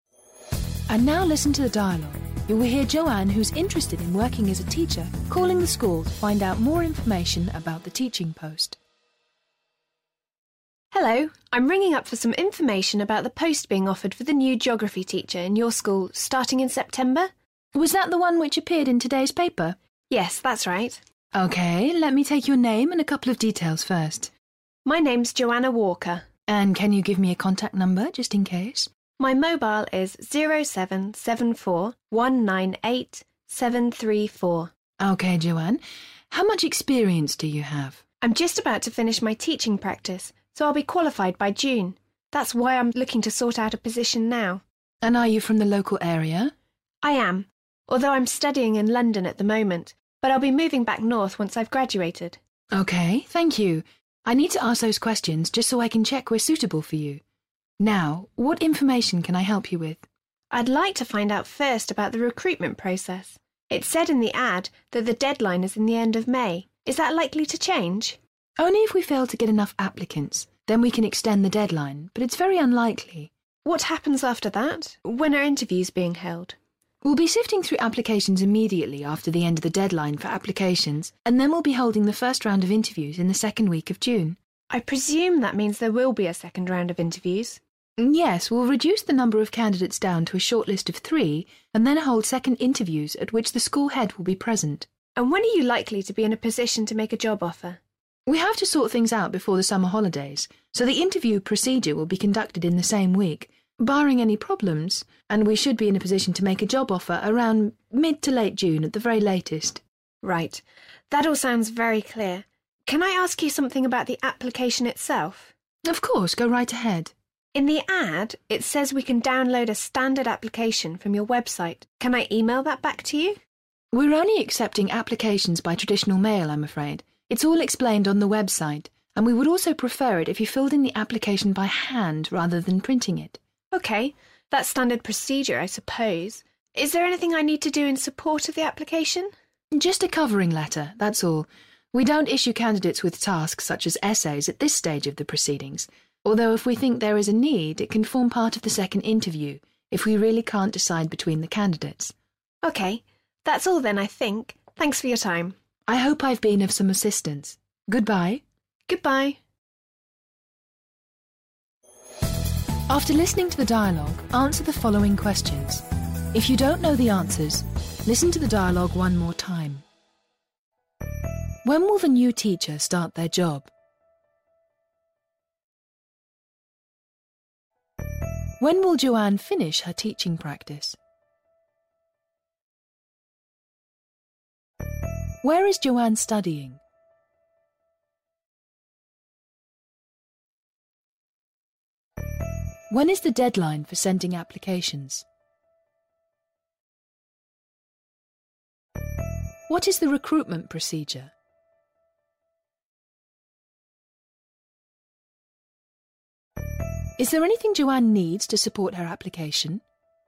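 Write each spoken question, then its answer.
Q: When will the new teacher start their job?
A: In September

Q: When will Joanne finish her teaching practice?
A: By June

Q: Where is Joanne studying?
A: In London

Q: When is the deadline for sending applications?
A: At the end of May

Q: What is the recruitment procedure?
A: First the applications are sorted, then first interviews in the second week of June, then a shortlist of 3 and second interviews with the head, then a job offer by mid to late June

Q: Is there anything Joanne needs to support her application?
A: Just a covering letter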